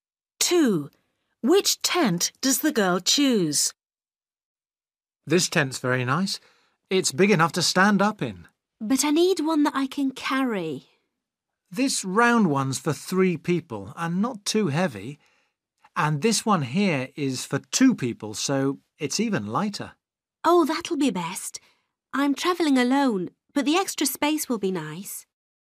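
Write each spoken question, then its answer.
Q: Which tent does the girl choose?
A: the light tent for 2 people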